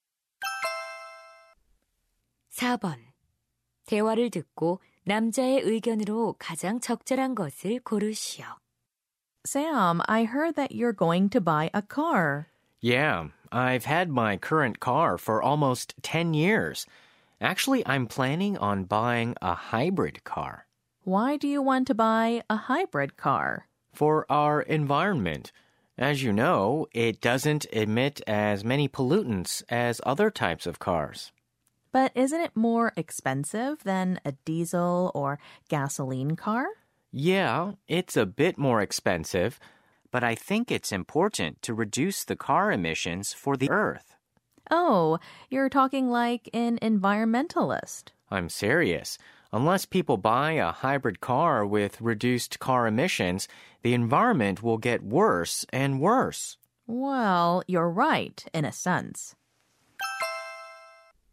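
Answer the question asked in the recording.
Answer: 환경을 위해 배출가스가 적은 하이브리드 차를 사야 한다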